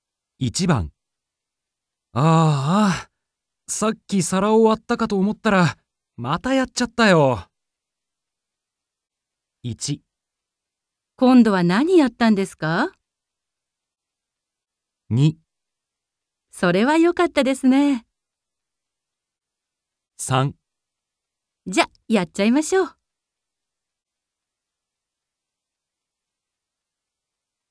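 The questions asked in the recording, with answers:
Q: ああ、さっき皿を割ったかと思ったら、またやっちゃったよ。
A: 1: 今度は何やったんですか?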